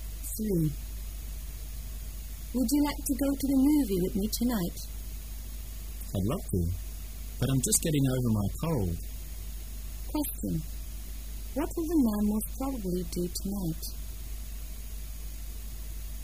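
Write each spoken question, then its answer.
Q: What will the man most probably do tonight?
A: Stay at home

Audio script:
[解析] W: Would you like to go to the movie with me tonight? M: I'd love to, but I'm just getting over my cold. Q: What will the man most probably do tonight?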